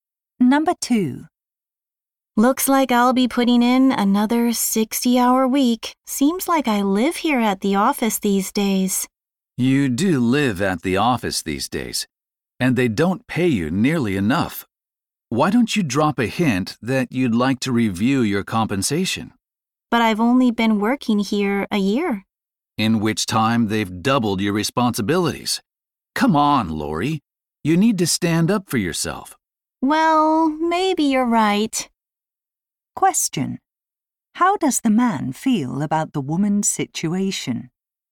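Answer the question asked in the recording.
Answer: He thinks she is underpaid and should ask for a raise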